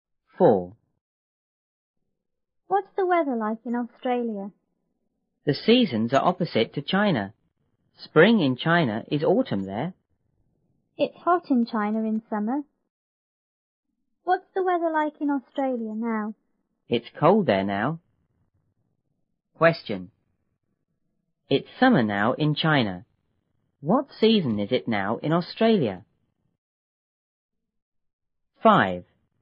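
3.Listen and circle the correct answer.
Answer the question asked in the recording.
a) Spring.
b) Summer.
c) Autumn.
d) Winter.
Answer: d) Winter.

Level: 六年级下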